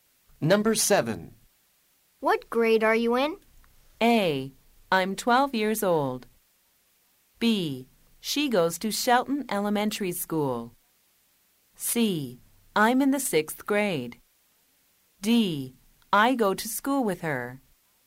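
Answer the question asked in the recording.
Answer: C: I'm in the 6th grade.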